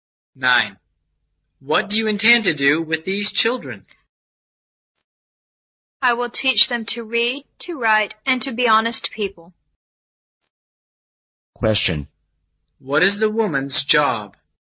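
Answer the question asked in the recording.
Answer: A teacher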